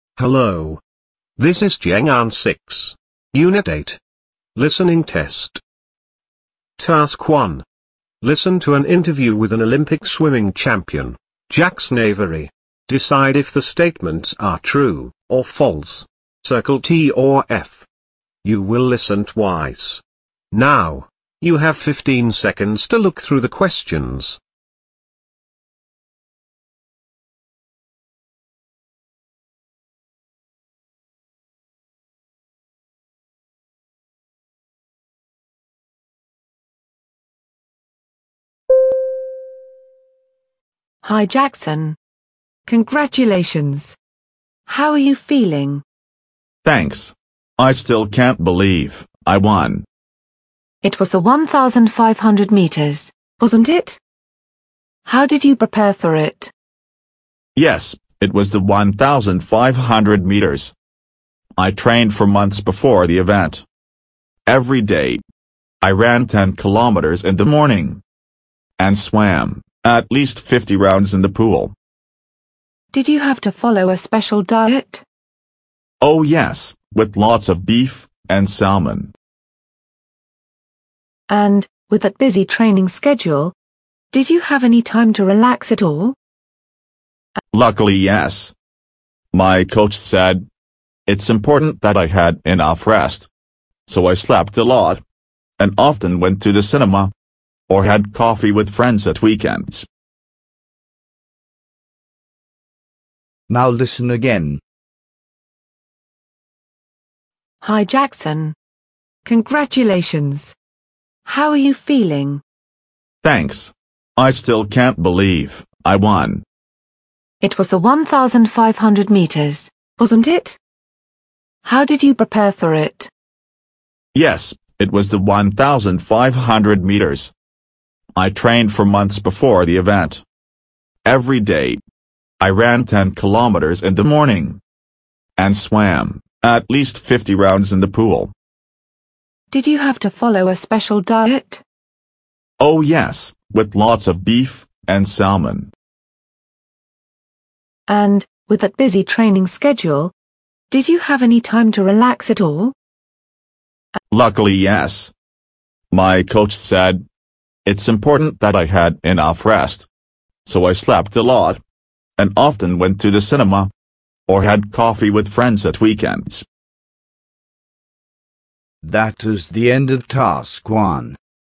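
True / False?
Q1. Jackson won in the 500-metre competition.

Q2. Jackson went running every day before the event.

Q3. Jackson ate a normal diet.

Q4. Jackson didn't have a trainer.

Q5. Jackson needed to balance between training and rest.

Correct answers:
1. False
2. True
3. False
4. False
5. True

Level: Môn thi: TIẾNG ANH 7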